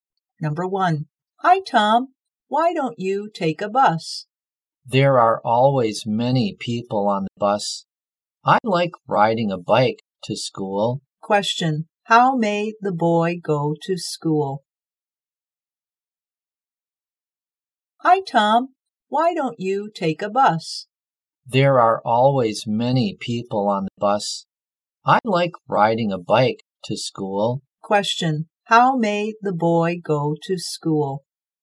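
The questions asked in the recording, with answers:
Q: How may the boy go to school?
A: By bike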